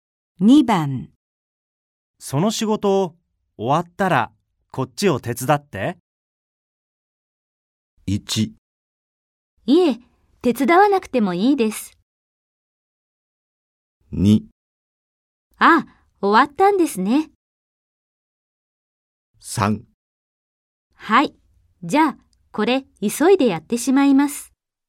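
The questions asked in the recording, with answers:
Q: その仕事を終わったらこっちを手伝って。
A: 3: はい、じゃあこれ急いでやってしまいます。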